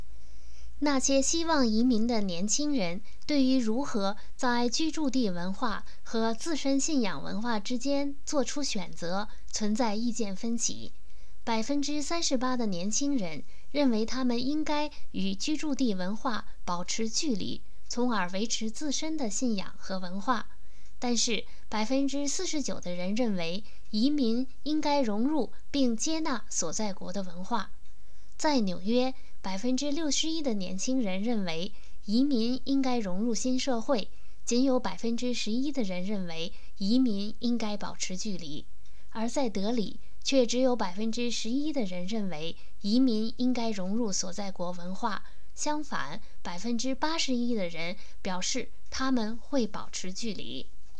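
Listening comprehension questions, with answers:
Please answer the following questions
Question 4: 有多少纽约的年轻人认为移民应该融入新社会?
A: 61%

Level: 3rd Year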